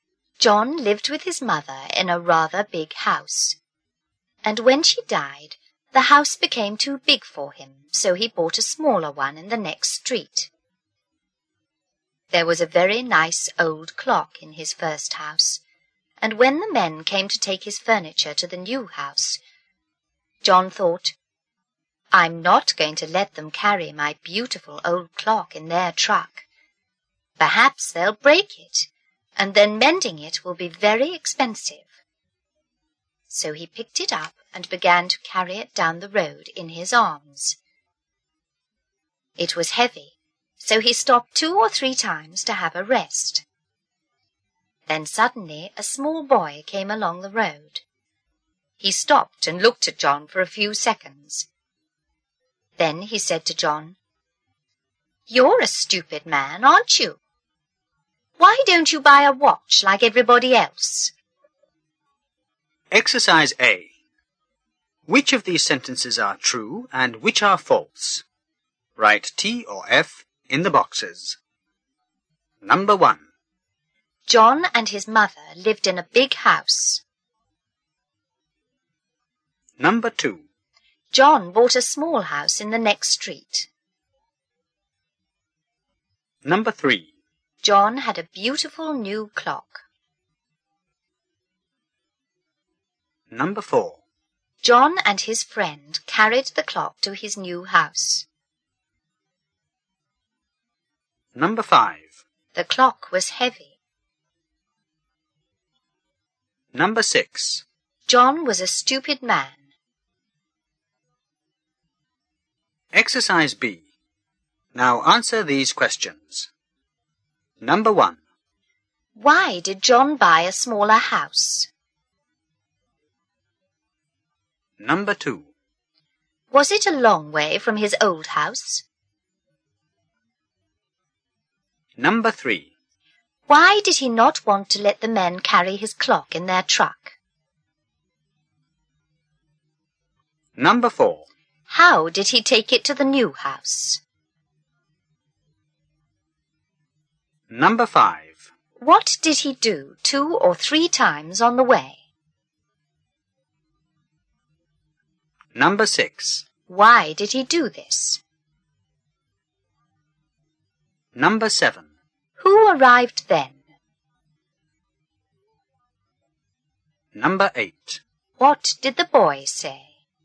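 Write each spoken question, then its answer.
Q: Why did John buy a smaller house?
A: His mother died and the house became too big for him

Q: Was it a long way from his old house?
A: No, it was in the next street

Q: Why did he not want to let the men carry his clock in their truck?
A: He thought they might break it and mending it would be expensive

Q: How did he take it to the new house?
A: He carried it down the road in his arms

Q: What did he do 2 or 3 times on the way?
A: He stopped to have a rest

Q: Why did he do this?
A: Because the clock was heavy

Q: Who arrived then?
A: A small boy

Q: What did the boy say?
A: You're a stupid man, aren't you? Why don't you buy a watch like everybody else?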